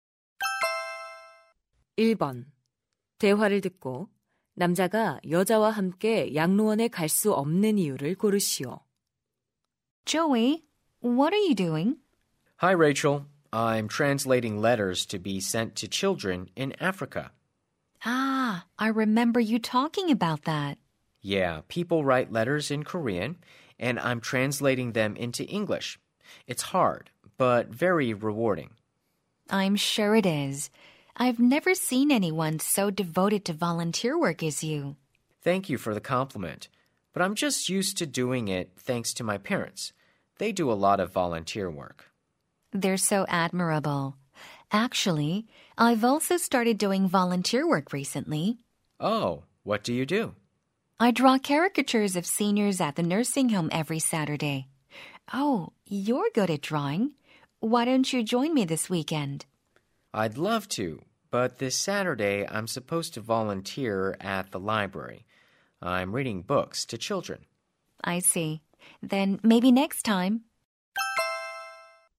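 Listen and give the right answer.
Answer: 토요일에 도서관에서 아이들에게 책을 읽어주는 봉사를 해야 해서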